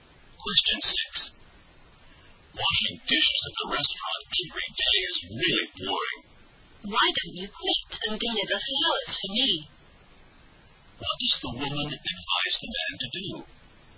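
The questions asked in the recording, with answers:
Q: What does the woman advise the man to do?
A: Quit his dishwashing job and deliver flowers for her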